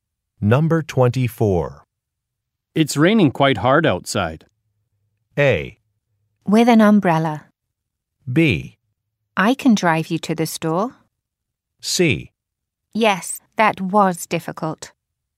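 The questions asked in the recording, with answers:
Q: It's raining quite hard outside.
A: B: I can drive you to the store.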